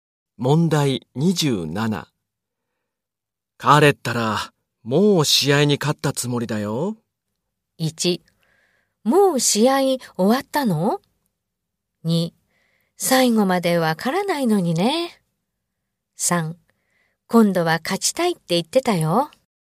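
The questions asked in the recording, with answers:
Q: 彼ったら、もう試合に勝ったつもりだよ。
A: 2: 最後までわからないのにね。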